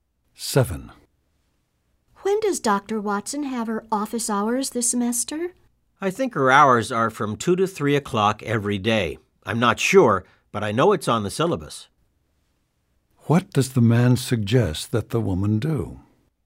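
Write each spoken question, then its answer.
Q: What does the man suggest that the woman do?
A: Check the syllabus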